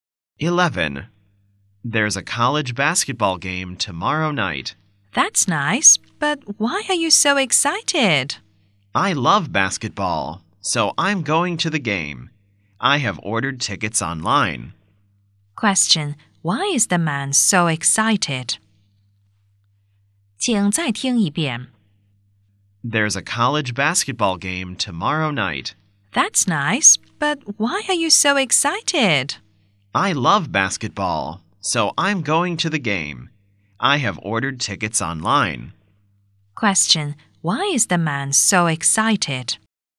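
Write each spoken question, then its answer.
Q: Why is the man so excited?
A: He loves basketball and is going to the game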